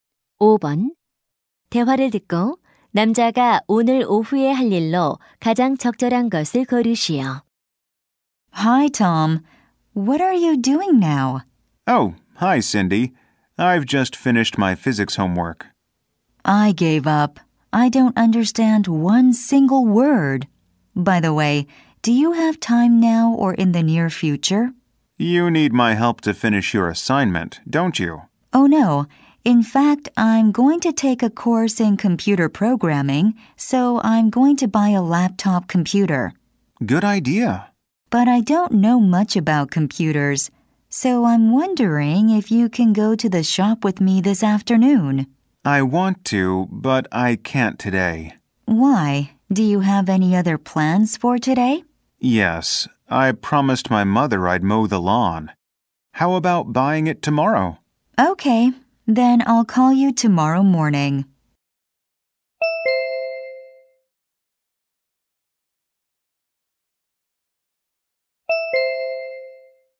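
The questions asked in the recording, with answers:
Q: 대화를 듣고 남자가 오늘 오후에 할 일로 가장 적절한 것을 고르시오.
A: 잔디 깎기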